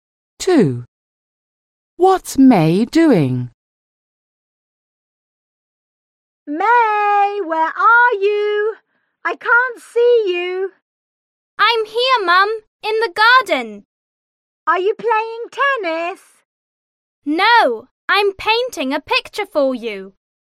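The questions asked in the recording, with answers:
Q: What's May doing?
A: Painting a picture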